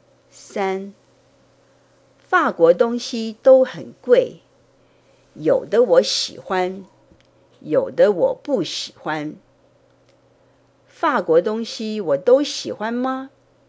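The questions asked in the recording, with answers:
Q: 法国东西我都喜欢吗?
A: 不,有的喜欢,有的不喜欢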